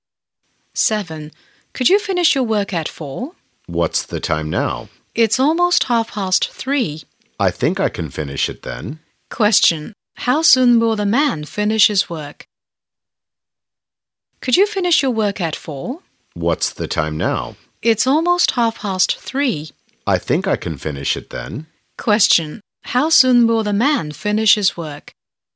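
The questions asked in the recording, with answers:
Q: How soon will the man finish his work?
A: In about half an hour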